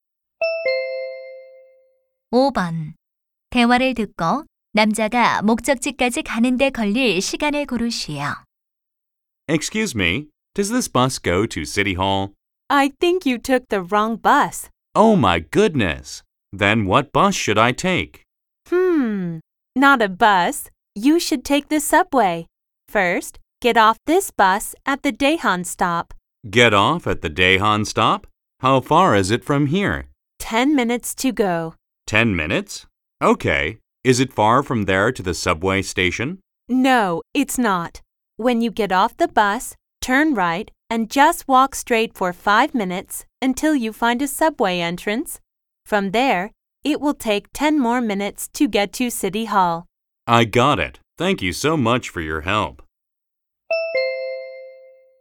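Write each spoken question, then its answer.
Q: 대화를 듣고 남자가 목적지까지 가는 데 걸릴 시간을 고르시오.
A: 25분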